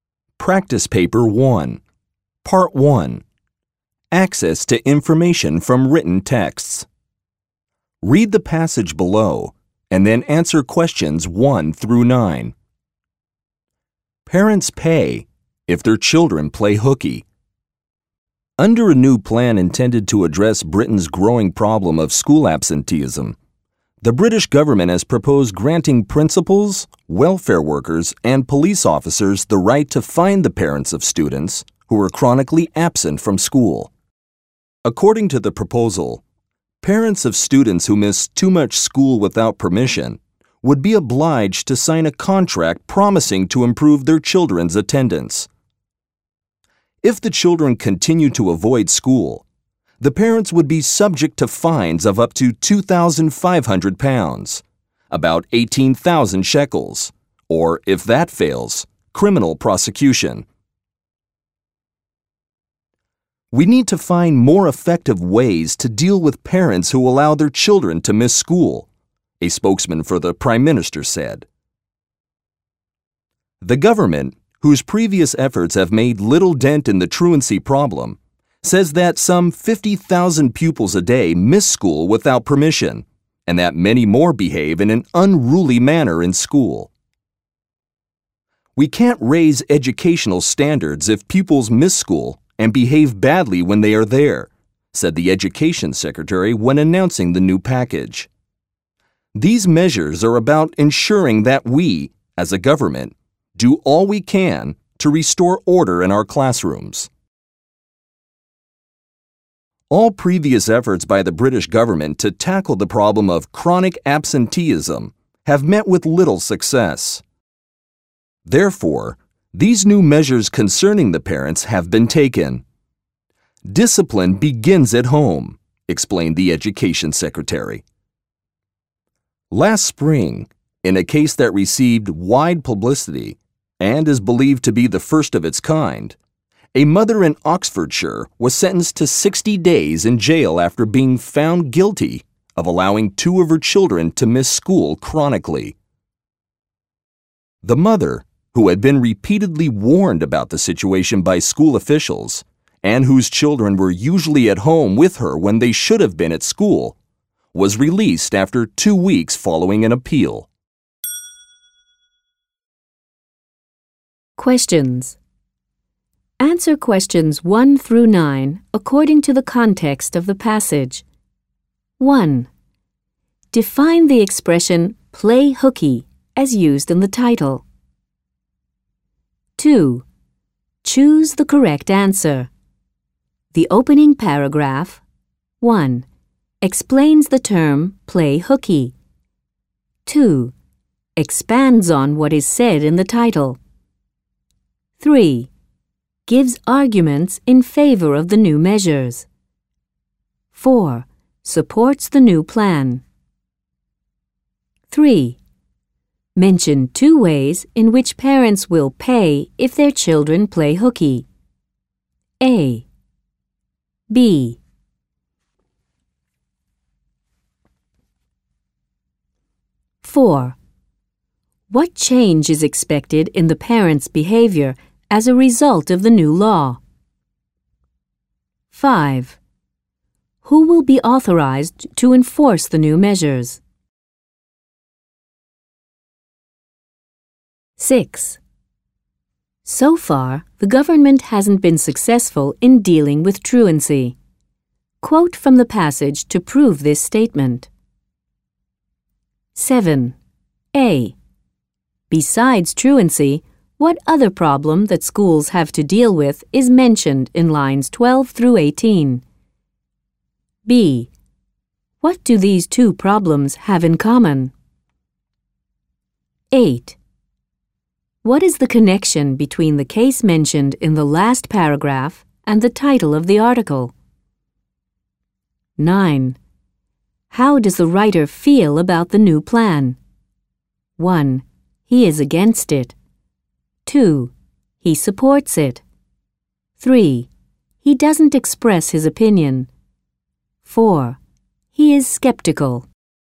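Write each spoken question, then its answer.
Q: Define the expression play hooky as used in the title.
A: To miss school without permission (truancy)

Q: The opening paragraph 1 explains the term play hooky.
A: 2: Expands on what is said in the title.

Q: Mention two ways in which parents will pay if their children play hooky.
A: Fines of up to £2,500; criminal prosecution

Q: What change is expected in the parents' behavior as a result of the new law?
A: They will make sure their children attend school

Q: Who will be authorized to enforce the new measures?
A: Principals, welfare workers and police officers

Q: So far, the government hasn't been successful in dealing with truancy.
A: "All previous efforts by the British government to tackle the problem of chronic absenteeism have met with little success."

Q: A. Besides truancy, what other problem that schools have to deal with is mentioned in lines 12 through 18?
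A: Pupils behaving in an unruly manner in school

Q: B. What do these two problems have in common?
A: Both prevent raising educational standards

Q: What is the connection between the case mentioned in the last paragraph and the title of the article?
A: A mother was punished (jailed) because her children played hooky

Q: How does the writer feel about the new plan?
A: 3: He doesn't express his opinion.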